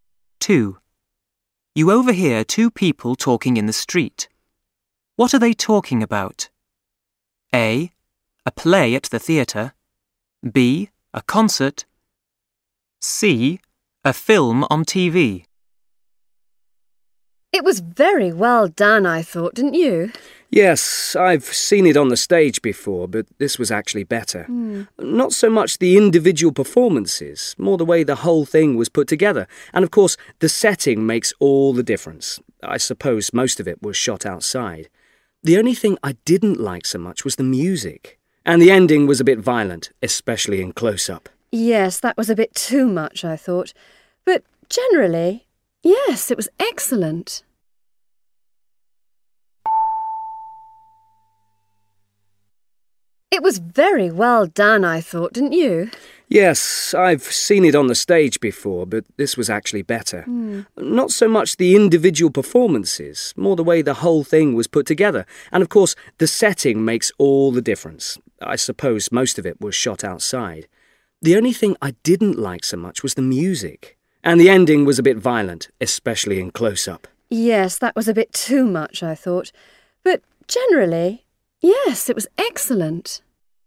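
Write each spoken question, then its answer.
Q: What are they talking about?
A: C: A film on TV.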